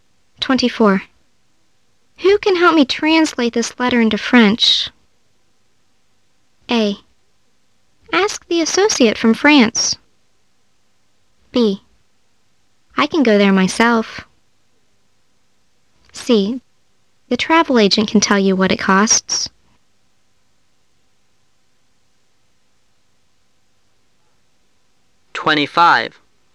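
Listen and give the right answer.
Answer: A: Ask the associate from France.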